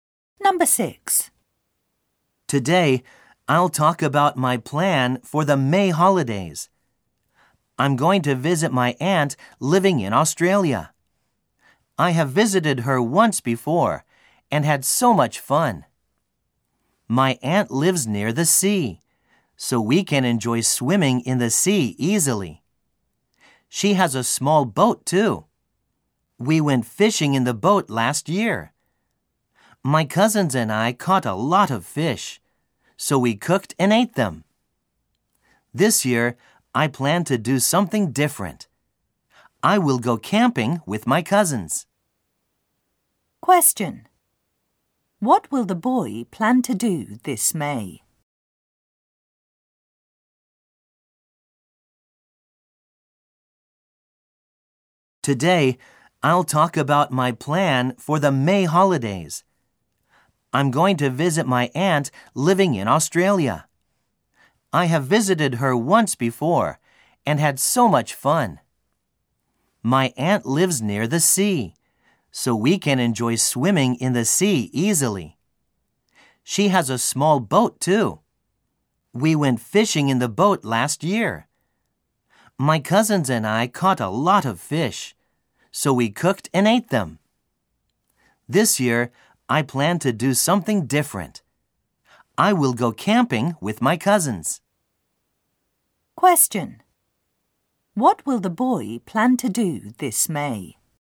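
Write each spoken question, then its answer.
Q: What will the boy plan to do this May?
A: Go camping with his cousins in Australia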